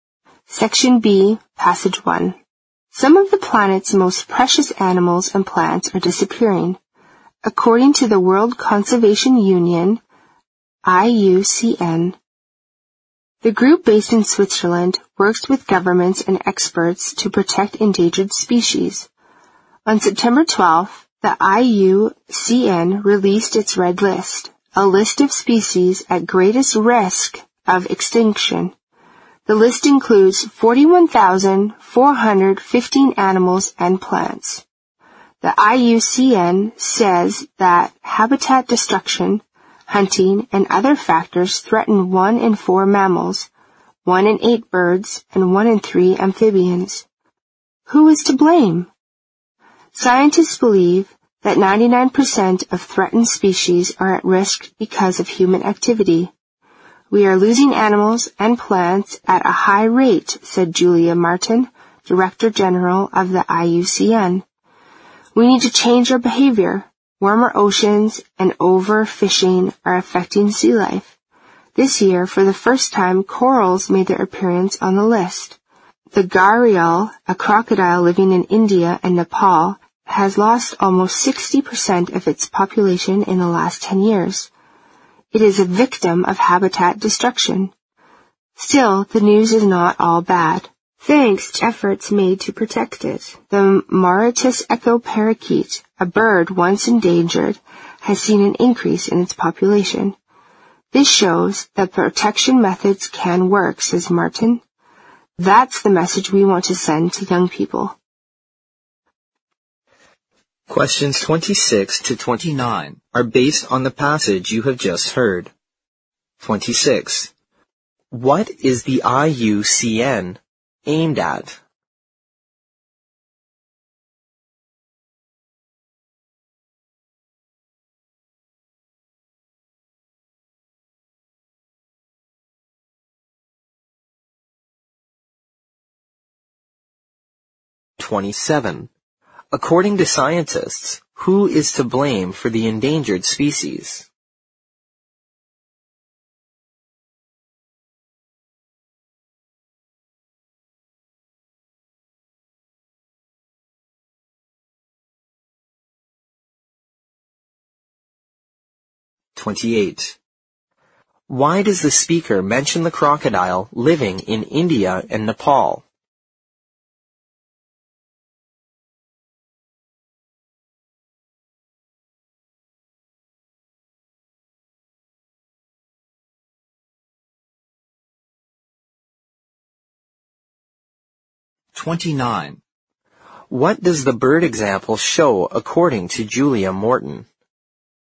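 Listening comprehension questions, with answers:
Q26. 26.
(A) Saving natural resources.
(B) Cultivating rare plants.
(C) Hunting for animal experts.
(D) Protecting threatened species.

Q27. 27.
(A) Ocean currents.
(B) Climate disorder.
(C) Human being.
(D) Natural disasters.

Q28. 28.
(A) It has threatened the normal life of other animals.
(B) It's an example of victims of habitat destruction.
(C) It's the most special sea life in these two countries.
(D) It has totally disappeared from these two countries.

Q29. 29.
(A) Species protection methods are effective.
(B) More people are changing their behavior.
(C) New energy substitutes are found for future use.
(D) The whole population of birds is increasing.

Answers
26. D
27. C
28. B
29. A

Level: 四级

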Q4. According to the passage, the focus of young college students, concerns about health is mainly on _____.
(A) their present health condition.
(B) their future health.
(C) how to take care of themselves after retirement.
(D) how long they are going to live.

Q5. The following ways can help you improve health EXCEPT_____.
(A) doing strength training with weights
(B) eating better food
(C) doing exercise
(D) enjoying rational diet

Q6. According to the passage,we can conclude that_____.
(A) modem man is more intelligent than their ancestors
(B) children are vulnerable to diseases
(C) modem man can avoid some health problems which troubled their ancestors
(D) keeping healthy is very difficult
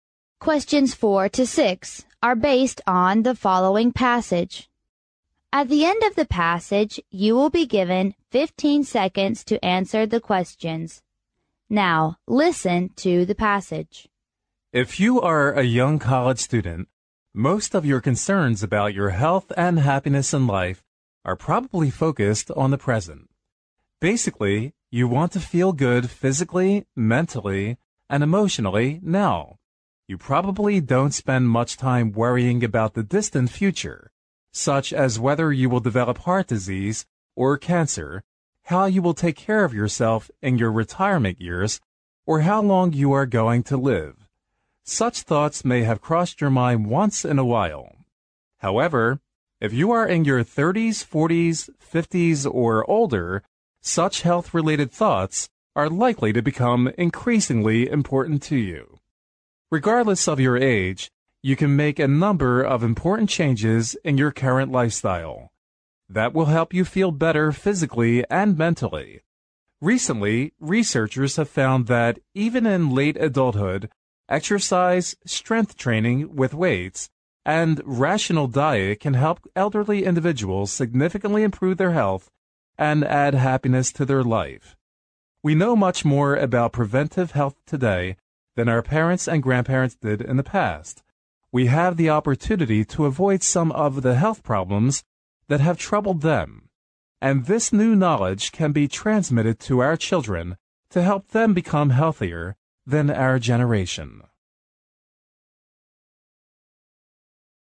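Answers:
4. A
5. B
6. C

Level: 英语四级

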